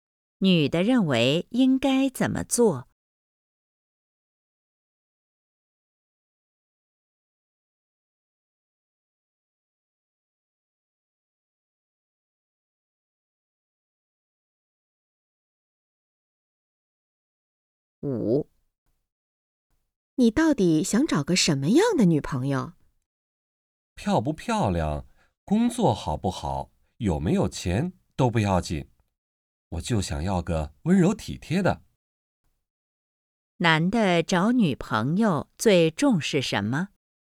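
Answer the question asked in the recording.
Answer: 温柔体贴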